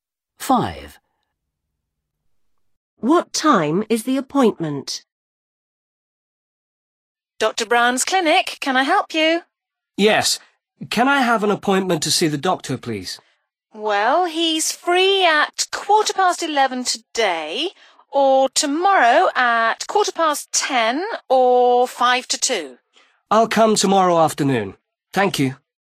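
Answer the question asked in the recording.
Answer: 2:05 tomorrow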